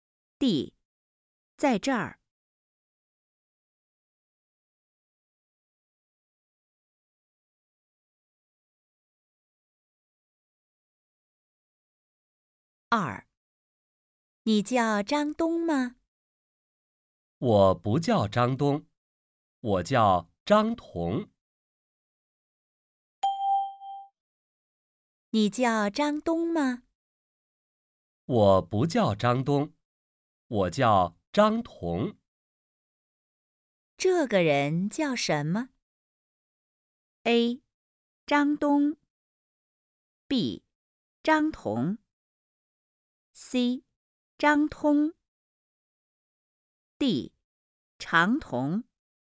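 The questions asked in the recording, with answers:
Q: 这个人叫什么?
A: B: 张彤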